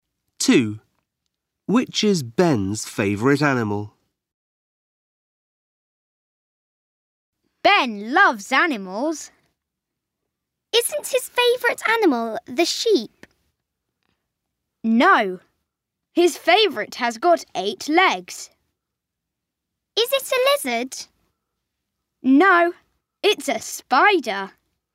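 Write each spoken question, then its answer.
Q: Which is Ben's favourite animal?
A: a spider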